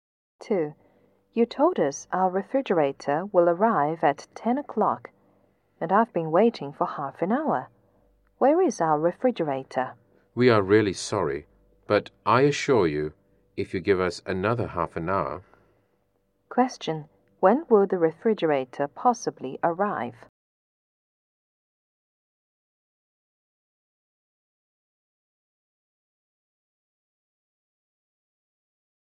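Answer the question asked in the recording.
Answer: At about 11 o'clock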